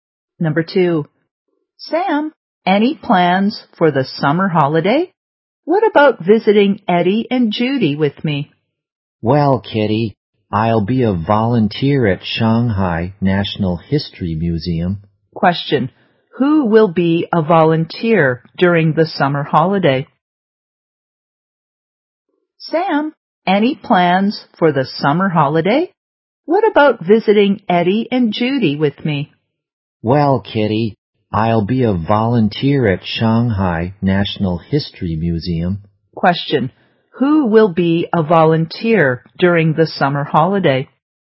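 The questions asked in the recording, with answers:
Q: Who will be a volunteer during the summer holiday?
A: Sam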